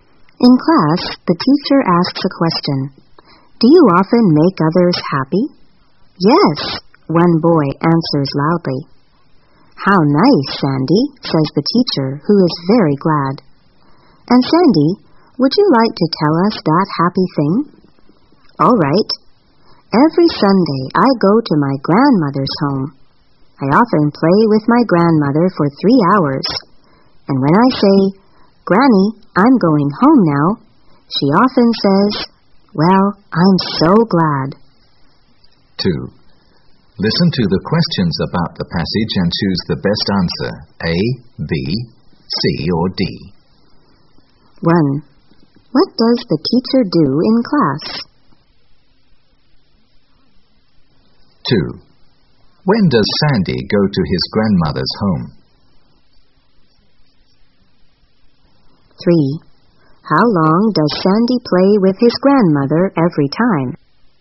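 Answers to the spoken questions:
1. She asks a question.
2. Every Sunday
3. For 3 hours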